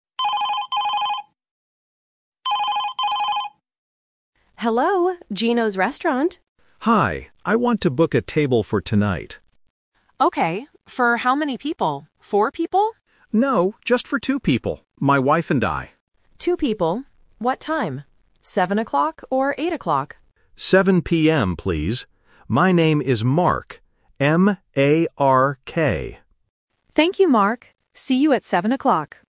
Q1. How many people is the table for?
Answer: 2

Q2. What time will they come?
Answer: 7:00 PM

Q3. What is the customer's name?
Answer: Mark